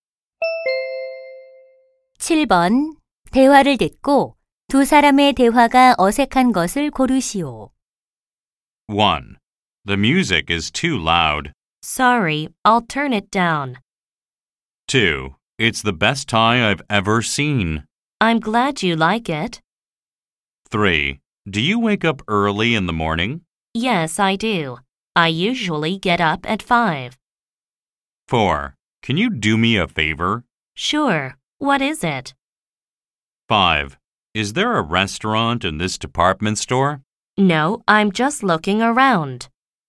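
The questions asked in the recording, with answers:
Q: 대화를 듣고 두 사람의 대화가 어색한 것을 고르시오.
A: 5: Is there a restaurant in this department store? / No, I'm just looking around.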